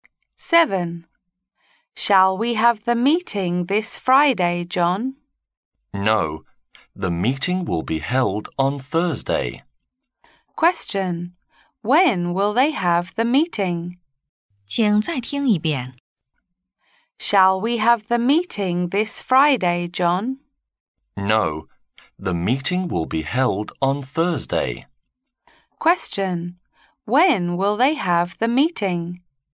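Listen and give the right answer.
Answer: On Thursday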